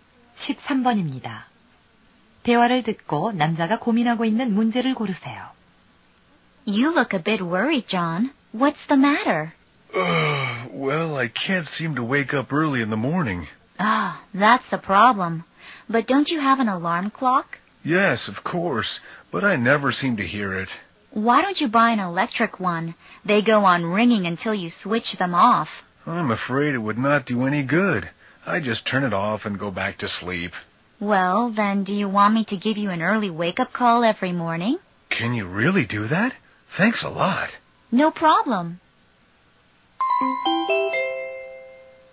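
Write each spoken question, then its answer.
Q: 대화를 듣고 남자가 고민하고 있는 문제를 고르세요.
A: 아침에 일찍 일어나지 못한다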